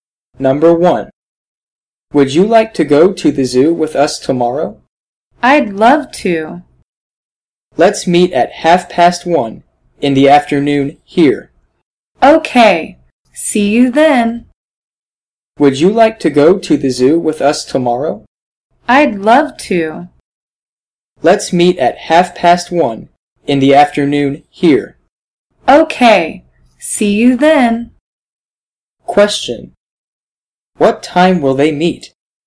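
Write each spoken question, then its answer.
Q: What time will they meet?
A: At 1:30 in the afternoon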